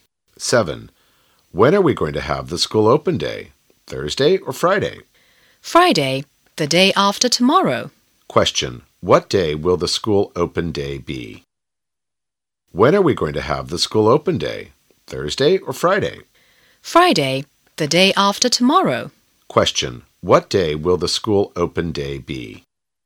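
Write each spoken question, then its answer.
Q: What day will the school open day be?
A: Friday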